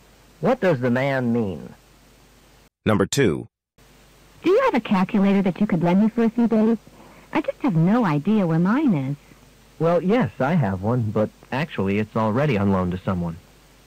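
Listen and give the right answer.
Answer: He can't lend his calculator because someone else has borrowed it.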